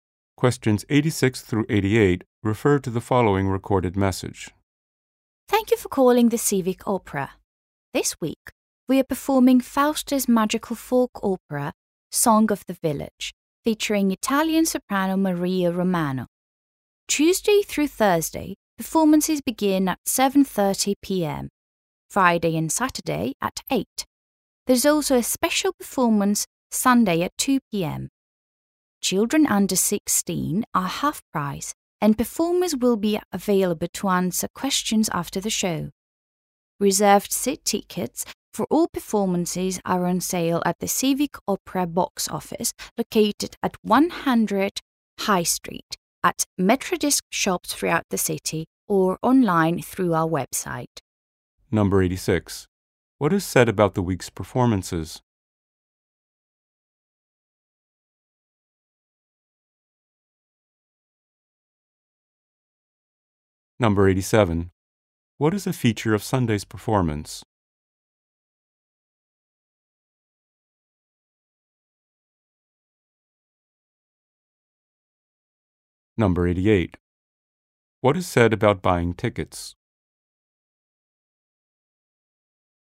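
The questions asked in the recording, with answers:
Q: What is said about buying tickets?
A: They are sold at the box office, Metrodisc shops, or online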